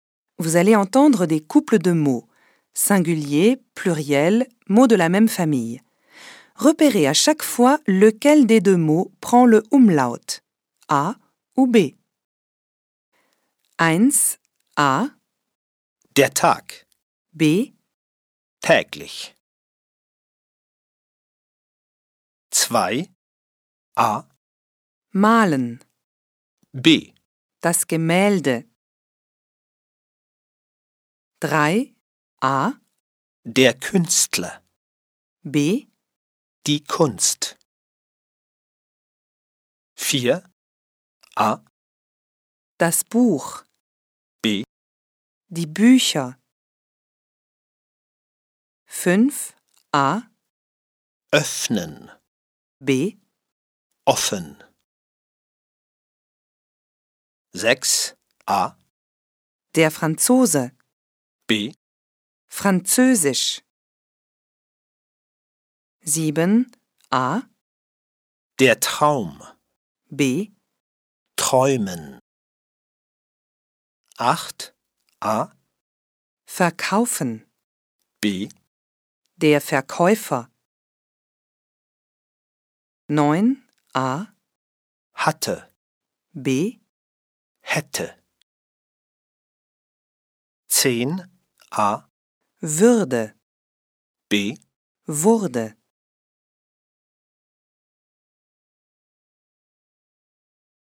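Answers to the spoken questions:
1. B: Täglich
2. B: Das Gemälde
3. A: Der Künstler
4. B: Die Bücher
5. A: Öffnen
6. B: Französisch
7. B: Träumen
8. B: Der Verkäufer
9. B: Hätte
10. A: Würde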